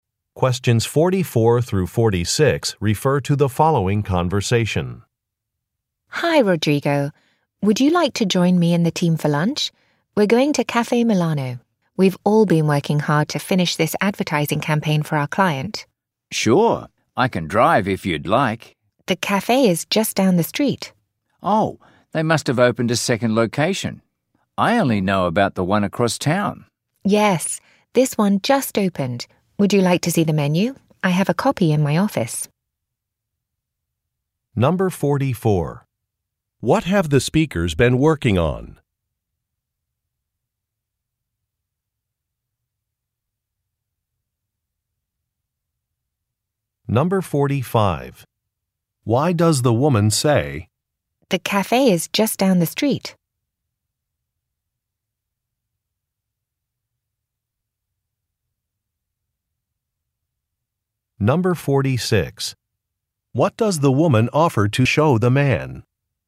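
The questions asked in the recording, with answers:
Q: What have the speakers been working on?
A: An advertising campaign for a client

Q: Why does the woman say, "The cafe is just down the street"?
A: To say there is no need to drive

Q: What does the woman offer to show the man?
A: A copy of the menu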